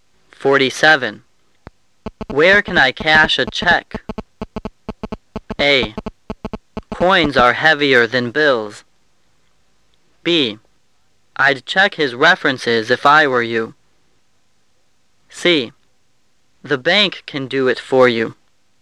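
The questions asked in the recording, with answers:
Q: Where can I cash a check?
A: C: The bank can do it for you.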